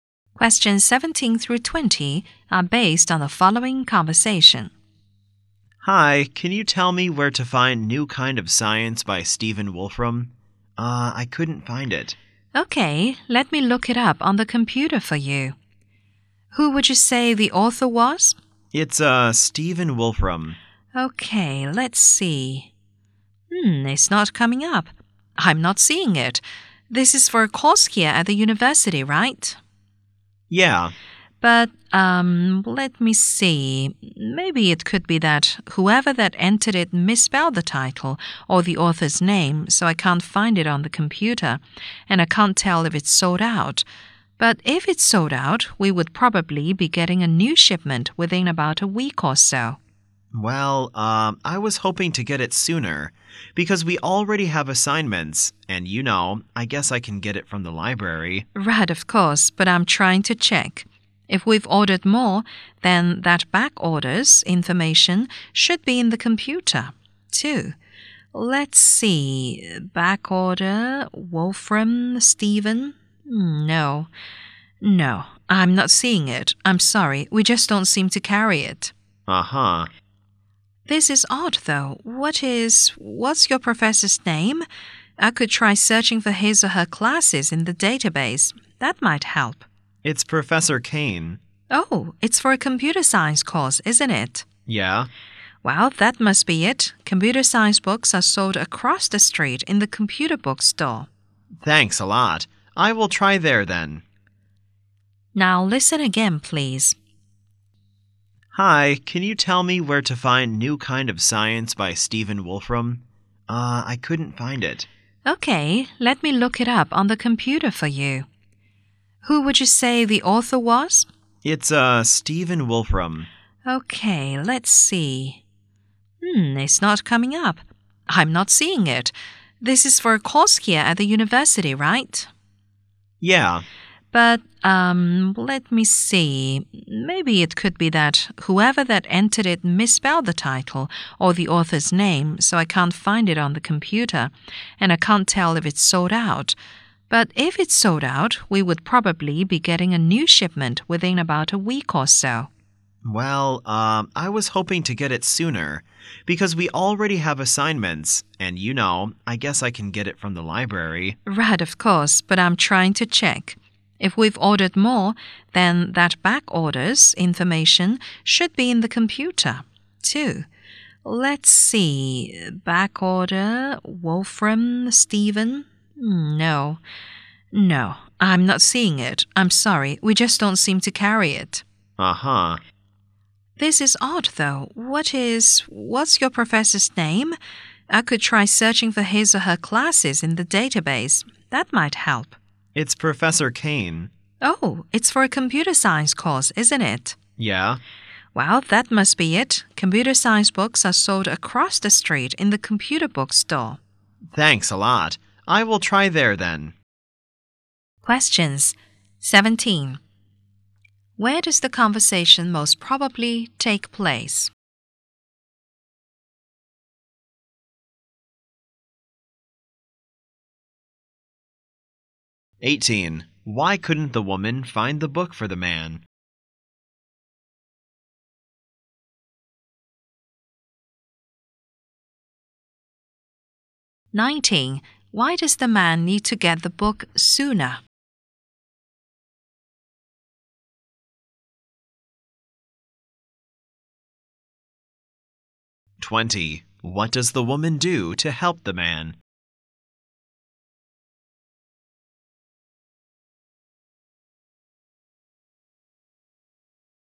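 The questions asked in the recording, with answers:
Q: Where does the conversation most probably take place?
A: In a university bookstore

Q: Why couldn't the woman find the book for the man?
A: Computer science books are sold in another store

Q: Why does the man need to get the book sooner?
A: He already has assignments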